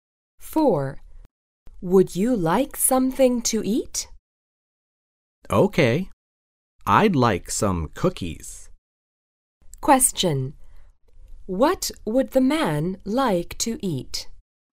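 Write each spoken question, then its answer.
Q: What would the man like to eat?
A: Cookies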